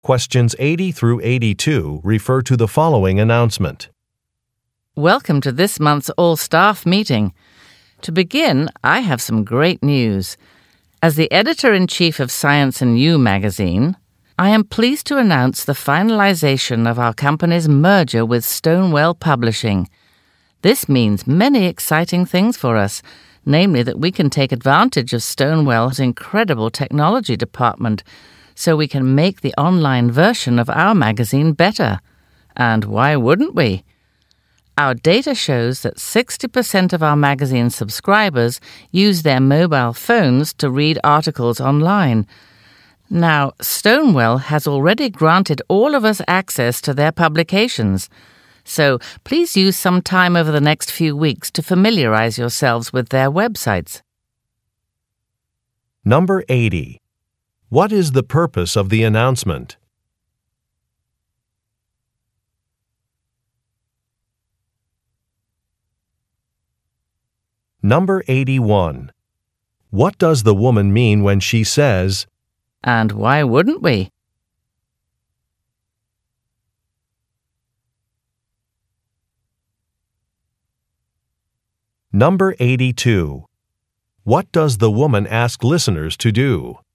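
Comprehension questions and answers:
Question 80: What is the purpose of the announcement?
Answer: To discuss an upcoming merger

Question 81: What does the woman mean when she says, "And why wouldn't we"?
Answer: She supports a decision.

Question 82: What does the woman ask listeners to do?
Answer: Review some information online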